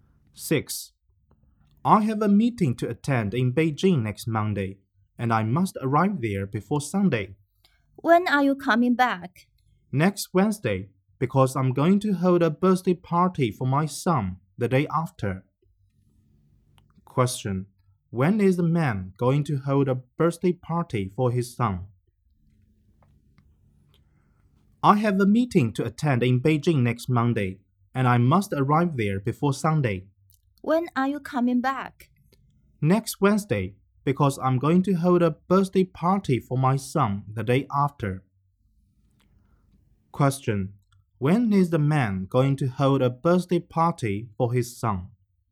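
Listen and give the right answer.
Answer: Next Thursday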